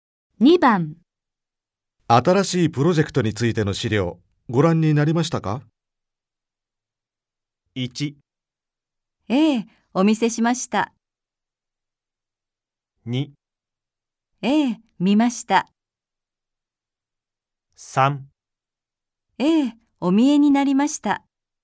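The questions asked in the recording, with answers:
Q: 新しいプロジェクトについての資料、ご覧になりましたか?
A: 2: ええ、見ました。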